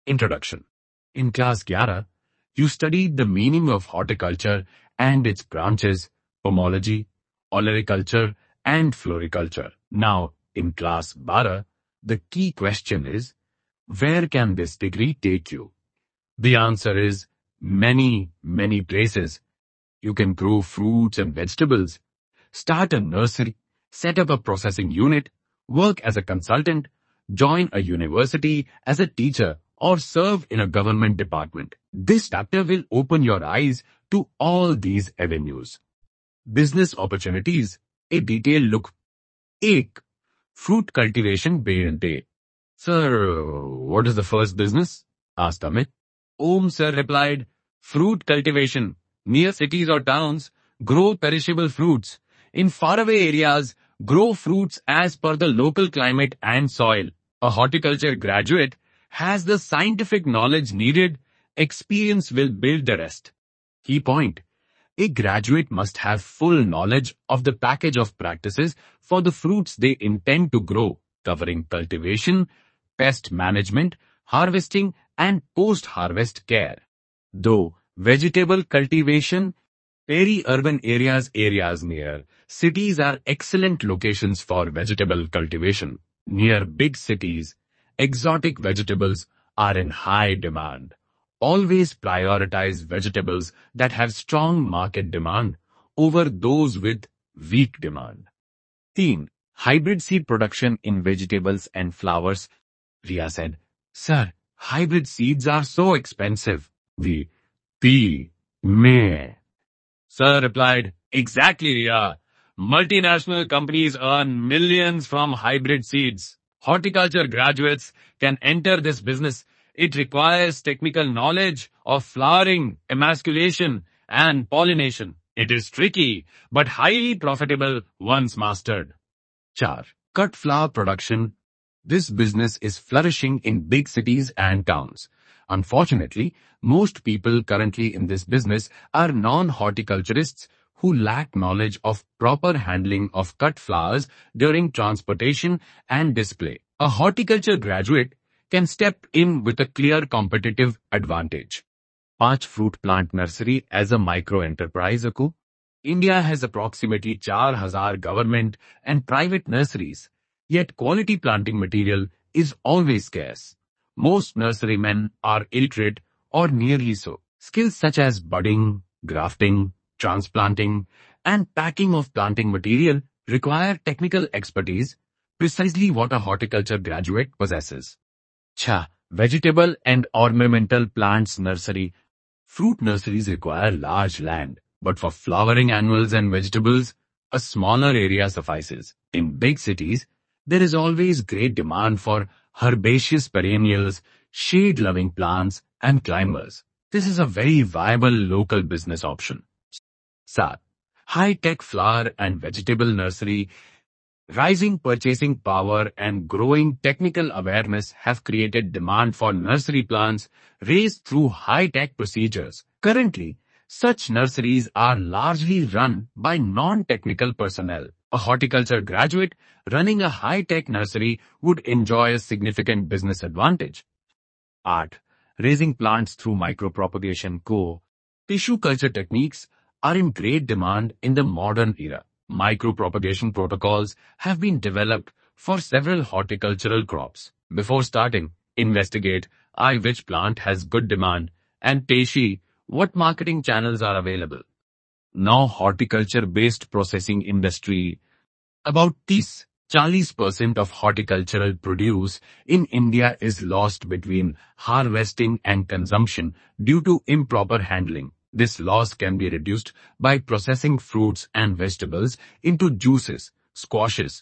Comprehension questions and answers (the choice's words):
Choose the correct option:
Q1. Approximately what percentage of horticultural produce in India is lost post-harvest?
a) 10–15%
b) 20–25%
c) 30–40%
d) 50–60%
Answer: 30–40%

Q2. Hybrid seeds are primarily produced by:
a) Small farmers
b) Government agencies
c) Multinational companies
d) NGOs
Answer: Multinational companies

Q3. The approximate number of Government and private fruit plant nurseries in India is:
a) 400,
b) 1,000,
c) 4,000,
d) 10,000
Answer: 4,000,

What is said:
In Class 11, you studied the meaning of horticulture and its branches — Pomology, Olericulture and Floriculture. Now in Class 12, the key question is: where can this degree take you? The answer is: many, many places.
You can grow fruits and vegetables, start a nursery, set up a processing unit, work as a consultant, join a university as a teacher, or serve in a government department. This chapter will open your eyes to all these avenues.
Business Opportunities — A Detailed Look
1. Fruit Cultivation
"Sir, what is the first business?" asked Amit.
Om Sir replied, "Fruit Cultivation! Near cities or towns, grow perishable fruits; in faraway areas, grow fruits as per the local climate and soil. A Horticulture graduate has the scientific knowledge needed — experience will build the rest."
Key Point: A graduate must have full knowledge of the 'package of practices' for the fruits they intend to grow — covering cultivation, pest management, harvesting and post-harvest care.
2. Vegetable Cultivation
Peri-urban areas (areas near cities) are excellent locations for vegetable cultivation. Near big cities, exotic vegetables are in high demand — always prioritise vegetables that have strong market demand over those with weak demand.
3. Hybrid Seed Production in Vegetables and Flowers
Riya said, "Sir, hybrid seeds are so expensive!"
Multinational companies earn millions from hybrid seeds. Horticulture graduates can enter this business — it requires technical knowledge of flowering, emasculation and pollination. It is tricky, but highly profitable once mastered."
4. Cut Flower Production
This business is flourishing in big cities and towns. Unfortunately, most people currently in this business are non-horticulturists who lack knowledge of proper handling of cut flowers during transportation and display. A Horticulture graduate can step in with a clear competitive advantage.
5. Fruit Plant Nursery as a Microenterprise
India has approximately 4,000 Government and private nurseries, yet quality planting material is always scarce. Most nurserymen are illiterate or nearly so. Skills such as budding, grafting, transplanting and packing of planting material require technical expertise — precisely what a Horticulture graduate possesses.
6. Vegetable and Ornamental Plants Nursery
Fruit nurseries require large land, but for flowering annuals and vegetables, a smaller area suffices. In big cities, there is always great demand for herbaceous perennials, shade-loving plants and climbers. This is a very viable local business option.
7. Hi-Tech Flower and Vegetable Nursery
Rising purchasing power and growing technical awareness have created demand for nursery plants raised through hi-tech procedures. Currently, such nurseries are largely run by non-technical personnel. A Horticulture graduate running a hi-tech nursery would enjoy a significant business advantage.
8. Raising Plants Through Micropropagation
Tissue culture techniques are in great demand in the modern era. Micropropagation protocols have been developed for several horticultural crops. Before starting, investigate: (i) which plant has good demand, and (ii) what marketing channels are available.
9. Horticulture-Based Processing Industry
About 30–40% of horticultural produce in India is lost between harvesting and consumption due to improper handling. This loss can be reduced by processing fruits and vegetables into juices, squashes, jams, jellies, pickles and preserves.

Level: Class 11